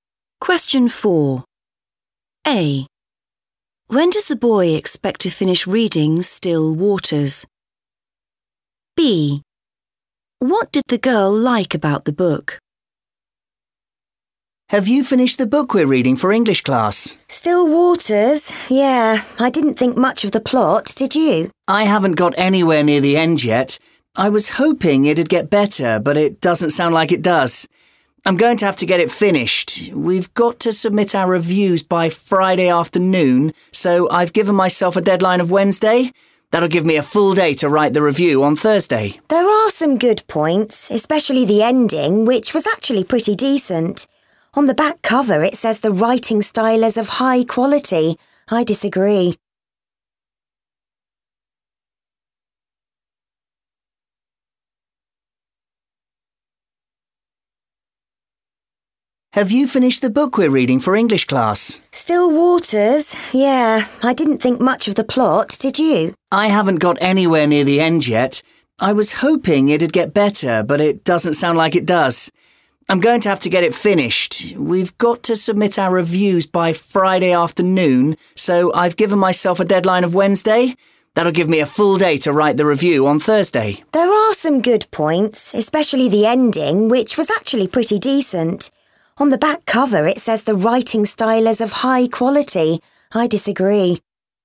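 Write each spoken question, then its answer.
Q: When does the boy expect to finish reading Still Waters?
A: Wednesday

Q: What did the girl like about the book?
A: the ending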